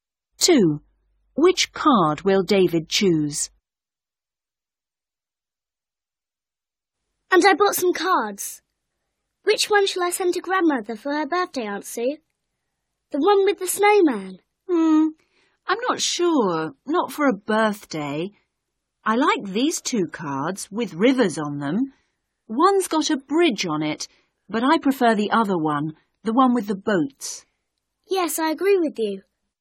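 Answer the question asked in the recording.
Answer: the card with the boats on a river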